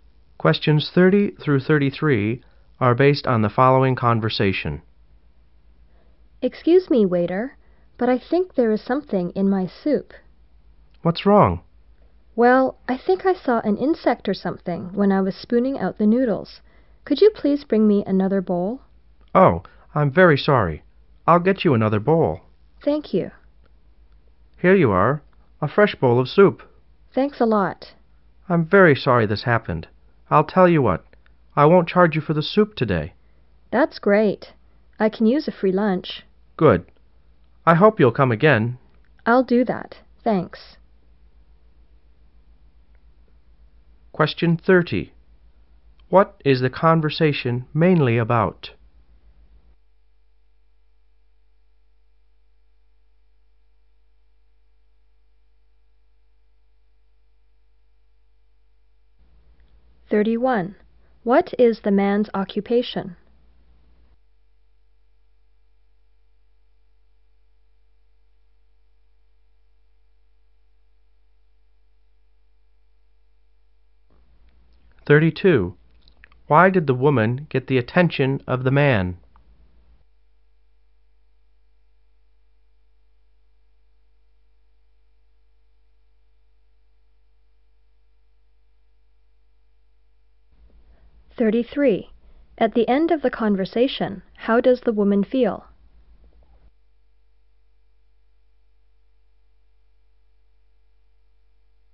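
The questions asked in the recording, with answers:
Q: What is the conversation mainly about?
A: An insect in a customer's soup

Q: What is the man's occupation?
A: Waiter

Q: Why did the woman get the attention of the man?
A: She saw an insect in her soup

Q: At the end of the conversation, how does the woman feel?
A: Pleased, because she gets a free lunch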